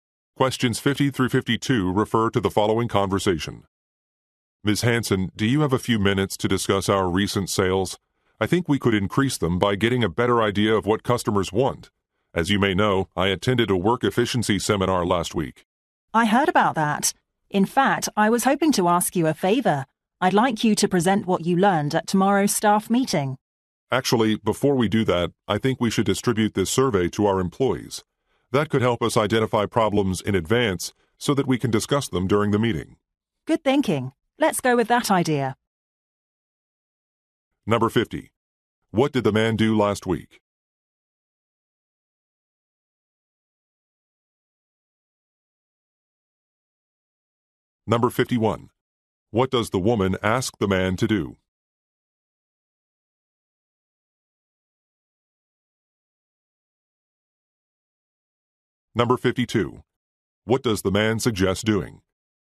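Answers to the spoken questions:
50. He attended a work efficiency seminar
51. Present what he learned at the staff meeting
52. Distributing a survey to employees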